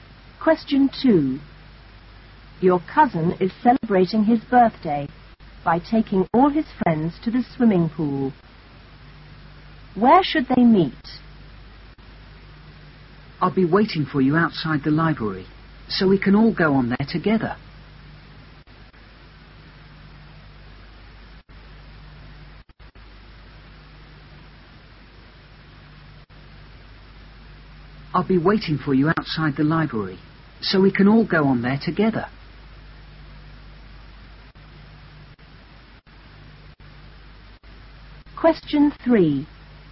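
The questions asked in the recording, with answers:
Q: Where should they meet?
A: Outside the library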